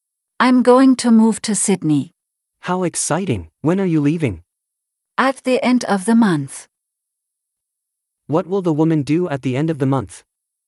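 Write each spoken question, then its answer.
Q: What will the woman do at the end of the month?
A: move to Sydney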